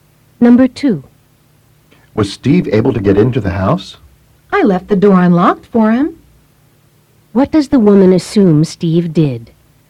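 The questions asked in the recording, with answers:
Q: What does the woman assume Steve did?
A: He got into the house through the unlocked door.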